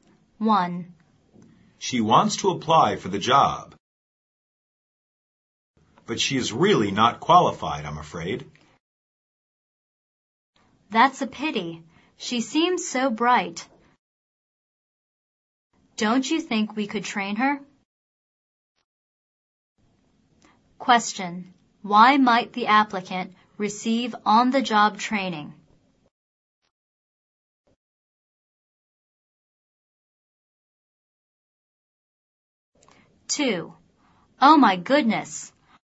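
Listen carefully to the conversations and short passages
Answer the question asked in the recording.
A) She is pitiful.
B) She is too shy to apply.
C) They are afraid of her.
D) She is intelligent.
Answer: D) She is intelligent.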